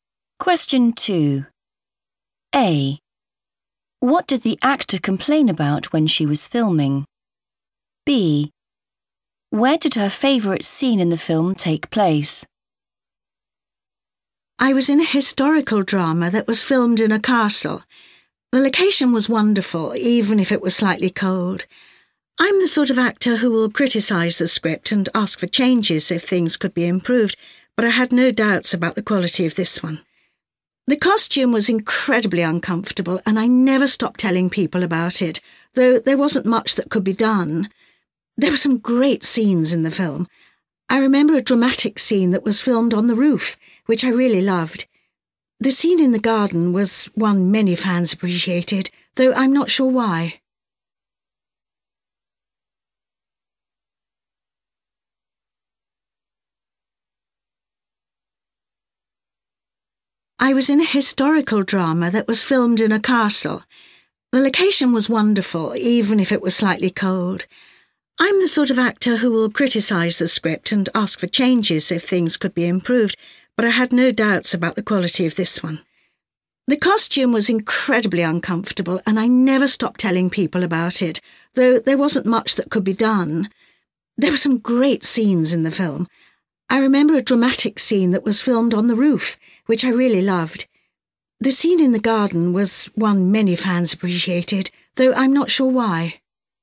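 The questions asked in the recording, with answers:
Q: What did the actor complain about when she was filming?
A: the costume

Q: Where did her favourite scene in the film take place?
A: on the roof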